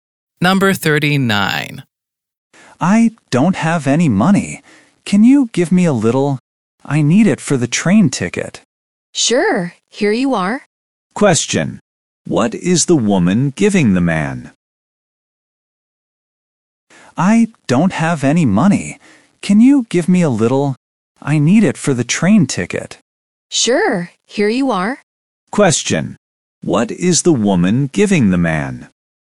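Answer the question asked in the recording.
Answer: Some money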